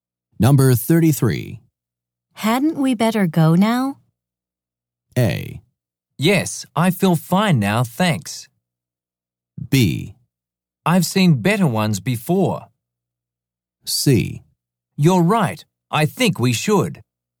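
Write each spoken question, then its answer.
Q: Hadn't we better go now?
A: C: You're right. I think we should.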